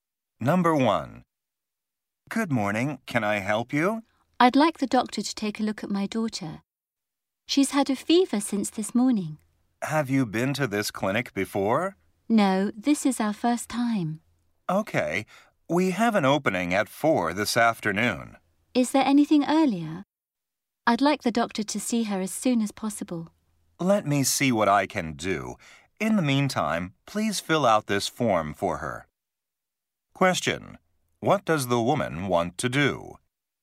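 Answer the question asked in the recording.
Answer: Have the doctor see her daughter as soon as possible (earlier than 4 p.m.).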